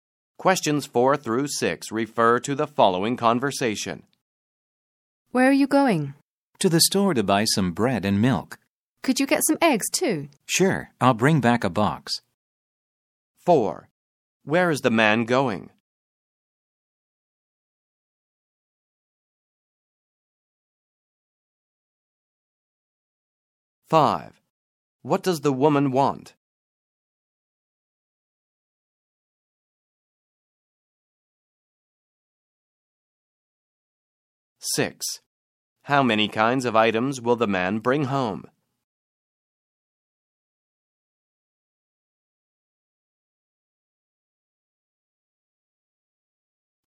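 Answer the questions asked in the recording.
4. To the store
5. Some eggs
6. Three (bread, milk and eggs)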